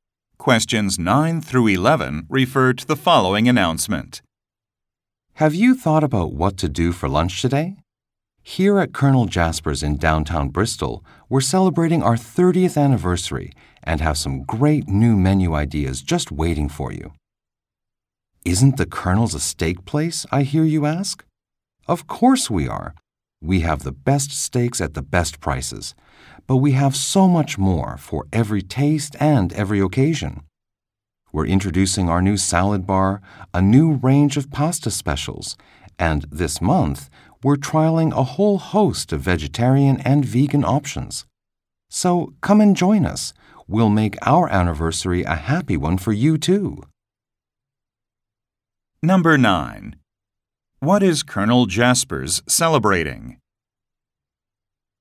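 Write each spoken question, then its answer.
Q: What is Colonel Jasper's celebrating?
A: Its 30th anniversary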